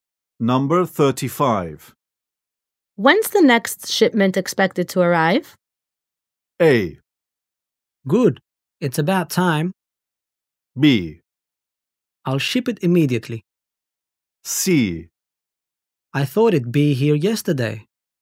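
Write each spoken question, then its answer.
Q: When's the next shipment expected to arrive?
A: C: I thought it'd be here yesterday.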